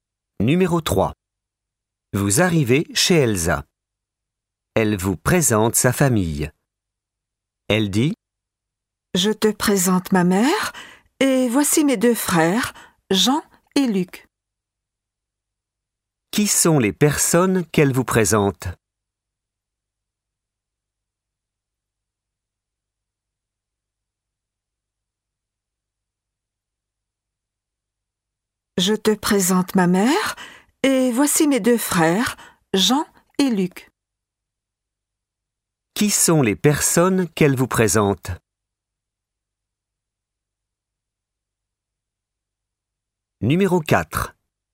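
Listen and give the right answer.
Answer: Sa mère et ses deux frères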